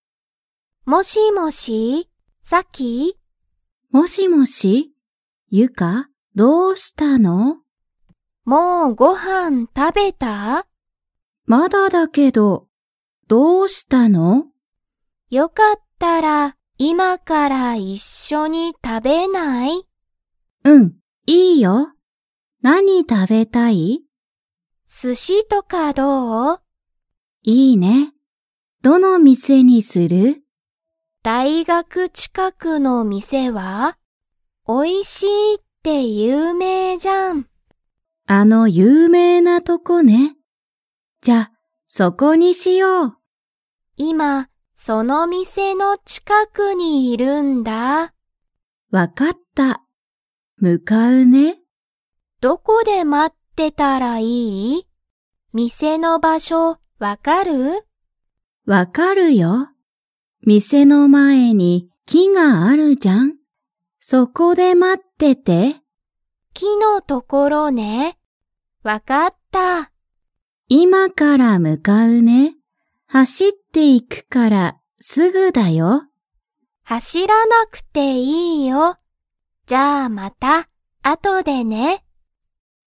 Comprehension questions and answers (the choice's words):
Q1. サキは、もうご飯(はん)を食(た)べましたか?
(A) はい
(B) いいえ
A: いいえ

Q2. その寿司(すし)の店(みせ)の前(まえ)に、____がある。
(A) ご飯(はん)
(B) 有名(ゆうめい)な店(みせ)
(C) 会社かいしゃ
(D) 木(き)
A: 木(き)

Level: Level 2